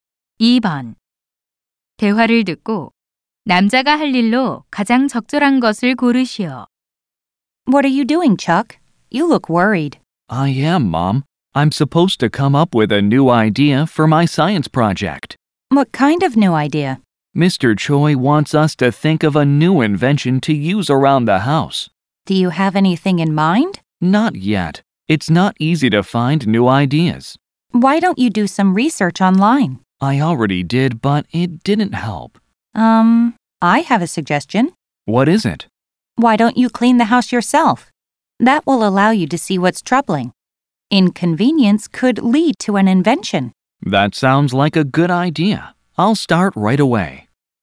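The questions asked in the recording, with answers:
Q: 대화를 듣고 남자가 할 일로 가장 적절한 것을 고르시오.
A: 직접 집 청소하기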